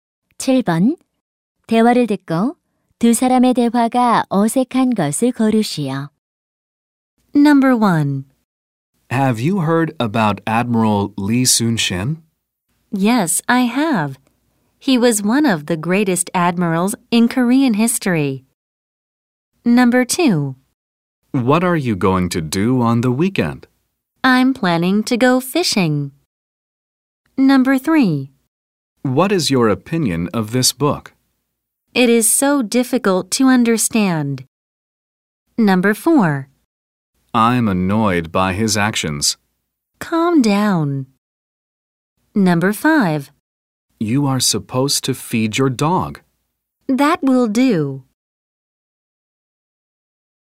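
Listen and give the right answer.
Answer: 5: You are supposed to feed your dog. / That will do.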